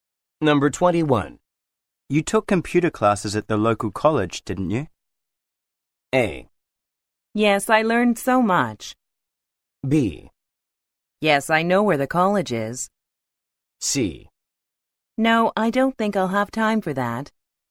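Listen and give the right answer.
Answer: A: Yes, I learned so much.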